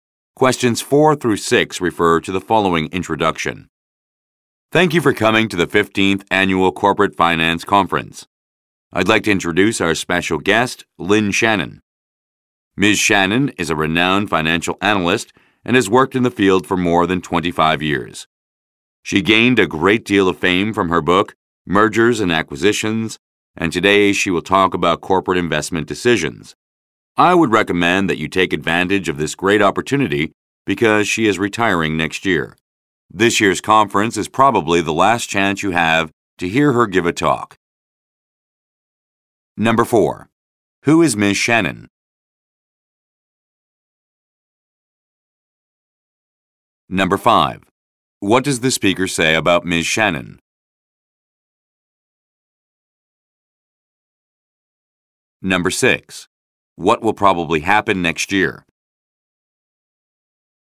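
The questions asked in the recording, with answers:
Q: Who is Ms. Shannon?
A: A renowned financial analyst

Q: What will probably happen next year?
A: Ms. Shannon will retire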